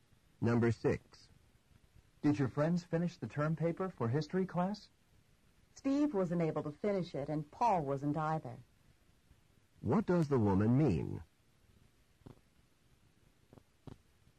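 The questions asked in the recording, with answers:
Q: What does the woman mean?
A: Neither Steve nor Paul finished the paper.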